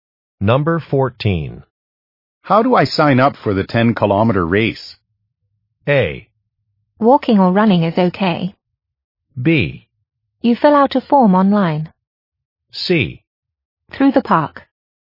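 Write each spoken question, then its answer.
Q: How do I sign up for the 10-kilometer race?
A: B: You fill out a form online.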